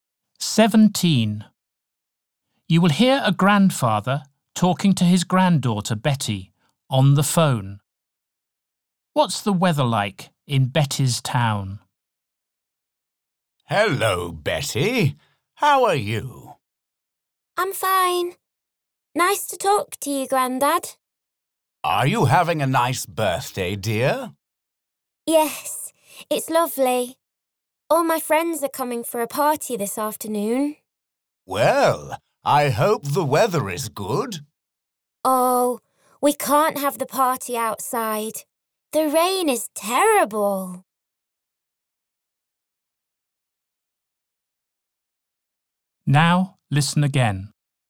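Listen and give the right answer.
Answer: It's raining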